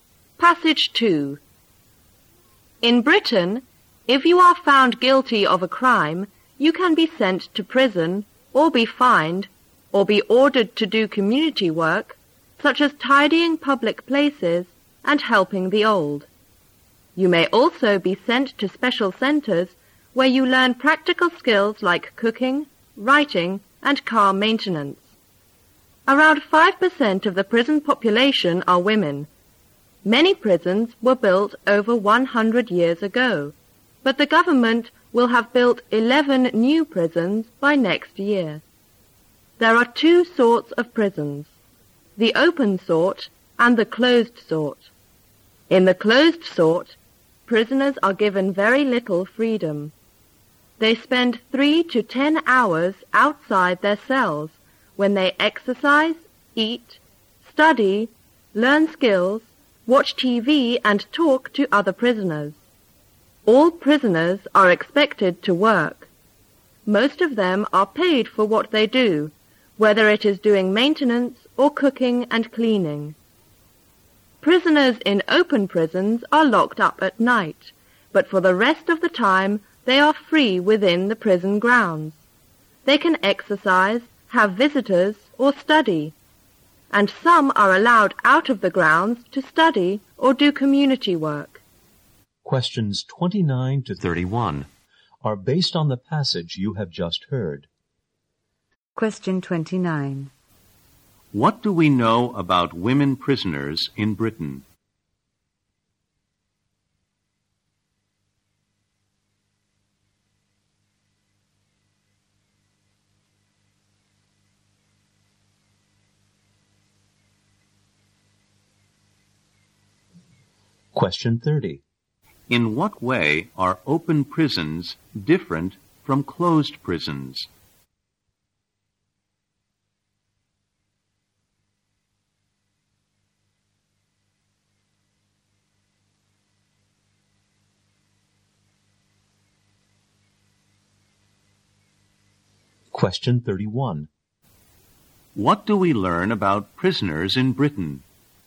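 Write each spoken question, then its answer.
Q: What do we know about women prisoners in Britain?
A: They make up about 5% of the prison population.

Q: In what way are open prisons different from closed prisons?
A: Prisoners are locked up only at night and are otherwise free within the prison grounds.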